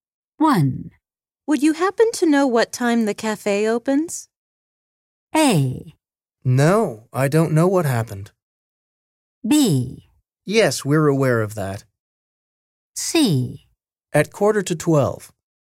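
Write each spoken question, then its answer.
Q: Would you happen to know what time the cafe opens?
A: C: At 11:45.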